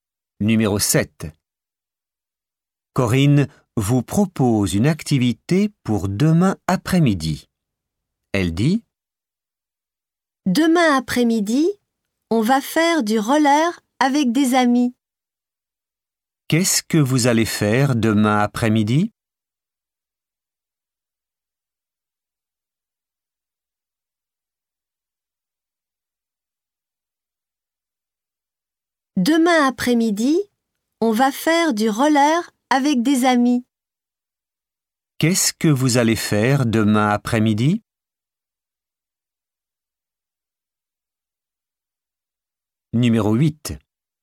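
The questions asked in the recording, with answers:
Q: Qu'est-ce que vous allez faire demain après-midi ?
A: Du roller avec des amis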